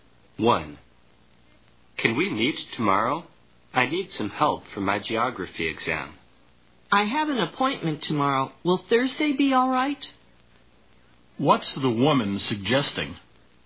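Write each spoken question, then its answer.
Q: What's the woman suggesting?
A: Meeting on Thursday instead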